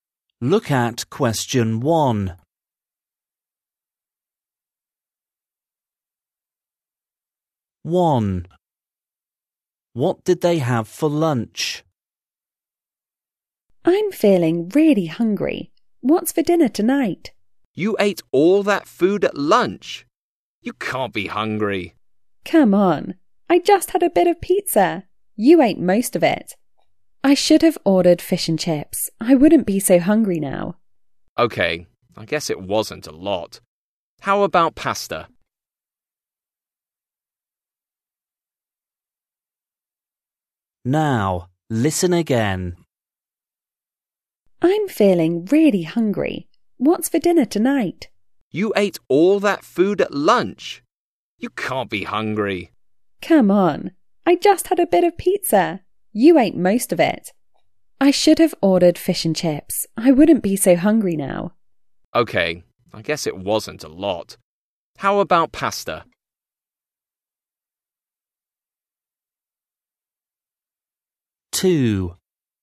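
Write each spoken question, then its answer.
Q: What did they have for lunch?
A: pizza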